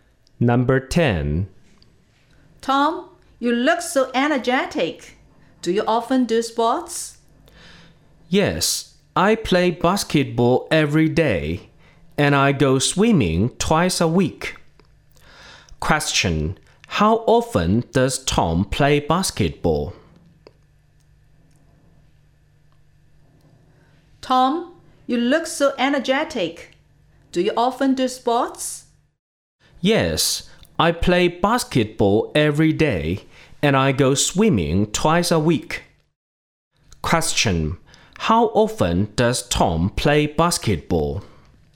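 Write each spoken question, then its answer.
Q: how often does Tom play basketball?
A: Every day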